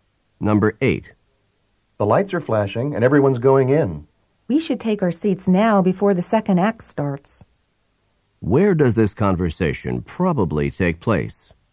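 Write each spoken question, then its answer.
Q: Where does this conversation probably take place?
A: At a theater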